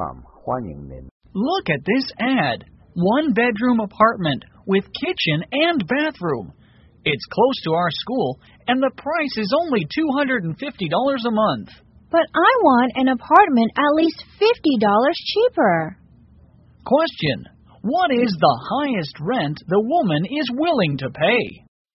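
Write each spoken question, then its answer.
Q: What is the highest rent the woman is willing to pay?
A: $200 a month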